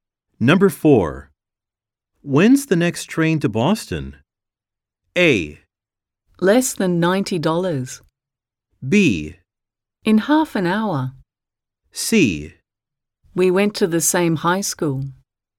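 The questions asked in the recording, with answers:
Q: When's the next train to Boston?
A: B: In half an hour.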